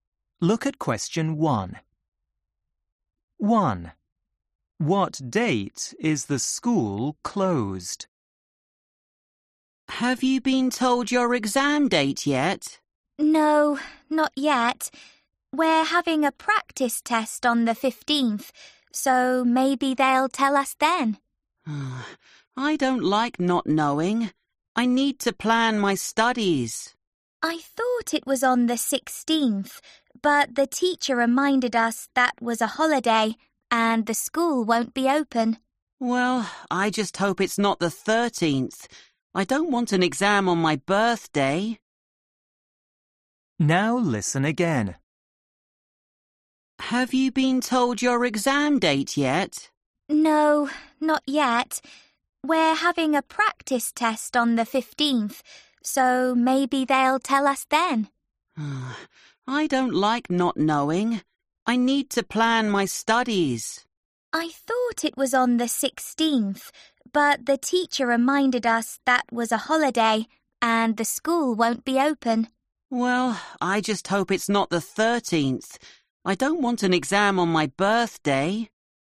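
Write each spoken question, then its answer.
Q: What date is the school closed?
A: the 16th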